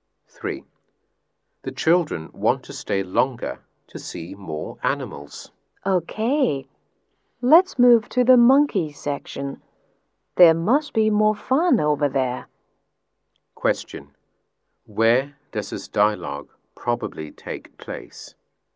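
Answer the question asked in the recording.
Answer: At the zoo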